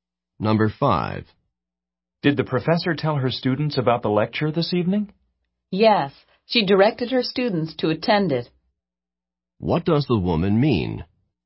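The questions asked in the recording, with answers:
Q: What does the woman mean?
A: The professor told her students to attend the lecture.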